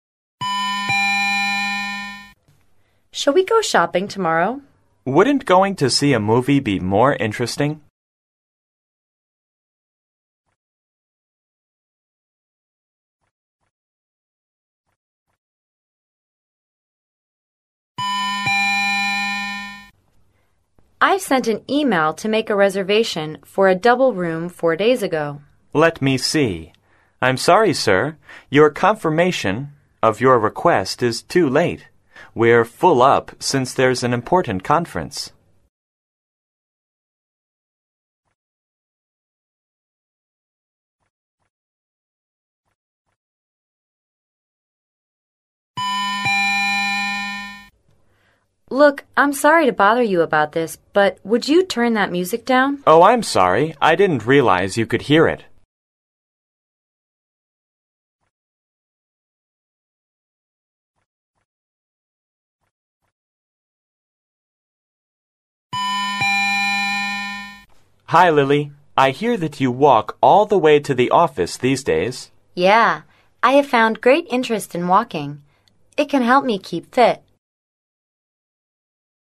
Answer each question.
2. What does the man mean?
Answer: Shopping is boring.

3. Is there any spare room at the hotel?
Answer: No, there's no spare room.

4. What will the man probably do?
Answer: Play the music more quietly.

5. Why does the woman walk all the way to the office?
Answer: She tries to keep fit by walking.